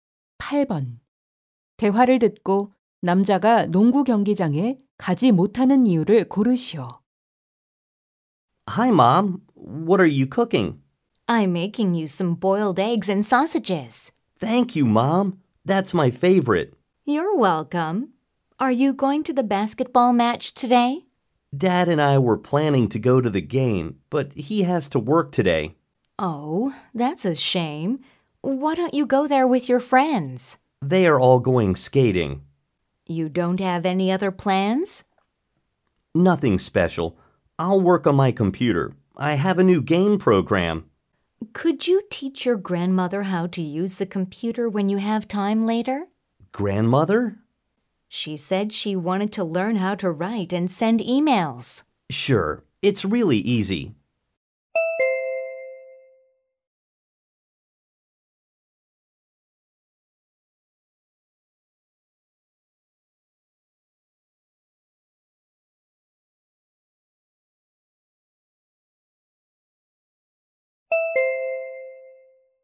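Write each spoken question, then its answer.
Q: 대화를 듣고 남자가 농구 경기장에 가지 못하는 이유를 고르시오.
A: 함께 가기로 한 아빠가 일을 해야 해서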